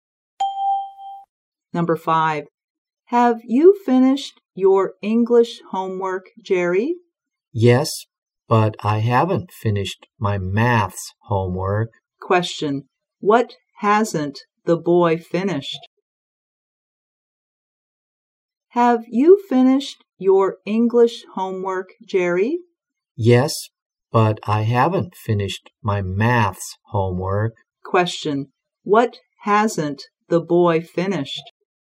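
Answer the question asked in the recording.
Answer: His maths homework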